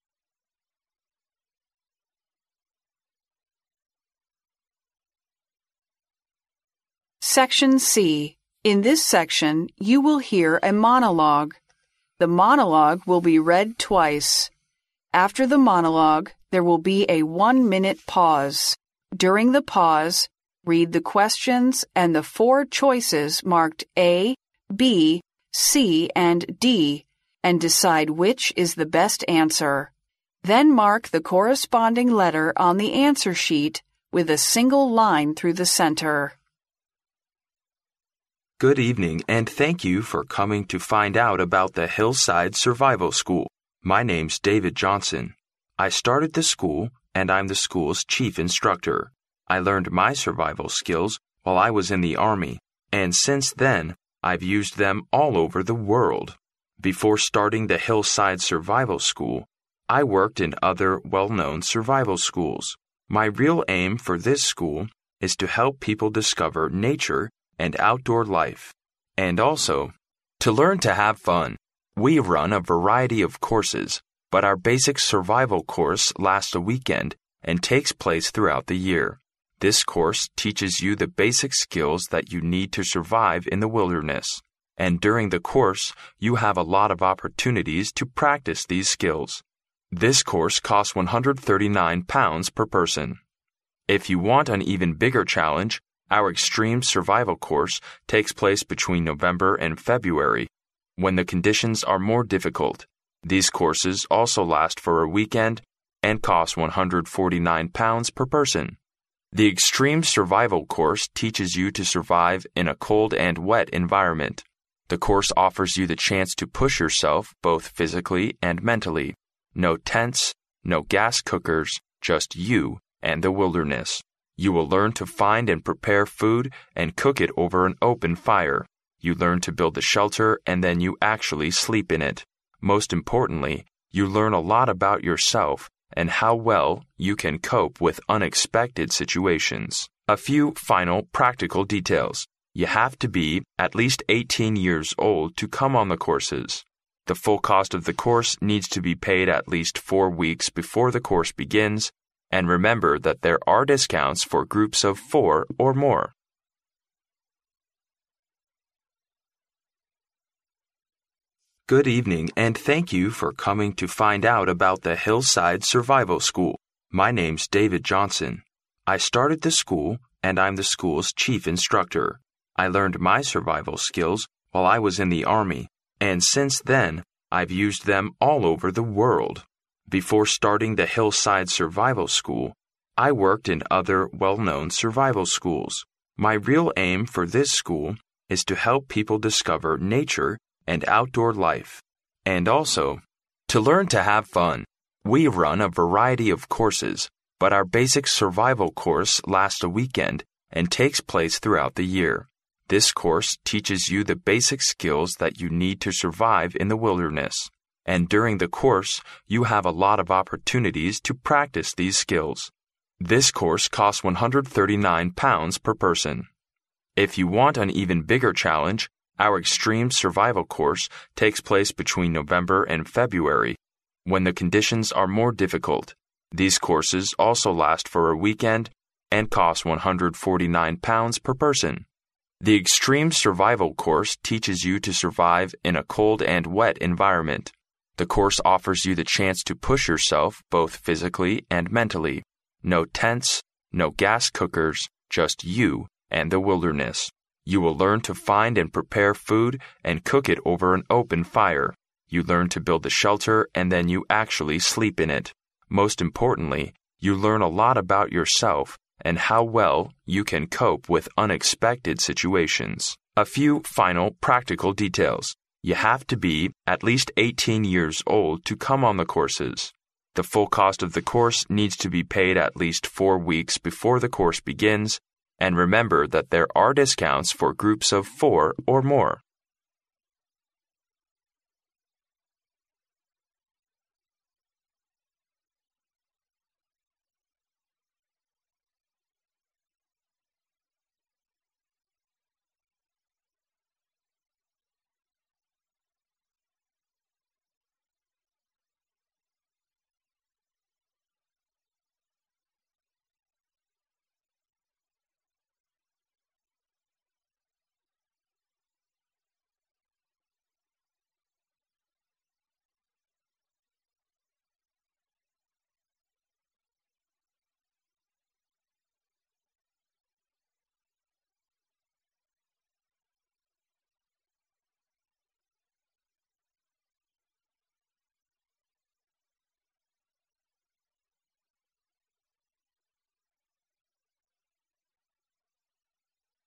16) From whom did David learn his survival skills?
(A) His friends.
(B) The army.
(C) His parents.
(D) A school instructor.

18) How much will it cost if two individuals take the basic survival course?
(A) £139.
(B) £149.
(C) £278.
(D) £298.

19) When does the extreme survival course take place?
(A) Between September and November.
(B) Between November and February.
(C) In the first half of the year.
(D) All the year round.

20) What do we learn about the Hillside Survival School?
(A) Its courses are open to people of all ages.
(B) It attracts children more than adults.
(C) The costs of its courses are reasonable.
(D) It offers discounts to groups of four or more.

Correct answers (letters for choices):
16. B
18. C
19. B
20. D

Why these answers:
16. 录音中David提到"I learned my survival skills while I was in the army",由此可知,他的生存技能是在军队学到的,故答案为B项。
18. 在讲述关于费用问题时,录音中提到"This course costs £139 per person.",即这门课程一个人花费139英镑,因此两人为278英镑,故选C项。
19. 关于极限生存课程的时间,录音中提到"our extreme survival course takes place between November and February",由此可知,该课程在11月到2月之间开设,故选B项。
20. 录音最后提到"there are discounts for groups of 4 or more",由此可知,四人或以上组团会有折扣,故答案为D项。

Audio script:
Good evening and thank you for coming to find out about the Hillside Survival School. My name's David Johnson. I started the school and I'm the school's chief instructor. I learned my survival skills while I was in the army and since then I've used them all over the world.
Before starting the Hillside Survival School, I worked in other well-known survival schools. My real aim for this school is to help people discover nature and outdoor life, and also to learn to have fun. We run a variety of courses but our basic survival course lasts a weekend and takes place throughout the year. This course teaches you the basic skills that you need to survive in the wilderness, and during the course you have a lot of opportunities to practice these skills. This course costs £139 per person.
If you want an even bigger challenge, our extreme survival course takes place between November and February when the conditions are more difficult. These courses also last for a weekend and costs £149 per person.
The extreme survival course teaches you to survive in a cold and wet environment. The course offers you the chance to push yourself, both physically and mentally. No tents, no gas cookers, just you and the wilderness. You learn to find and prepare food and cook it over an open fire. You learn to build a shelter and then you actually sleep in it. Most importantly, you learn a lot about yourself and how well you can cope with unexpected situations.
A few final practical details. You have to be at least 18 years old to come on the courses. The full cost of the course needs to be paid at least 4 weeks before the course begins and remember that there are discounts for groups of 4 or more.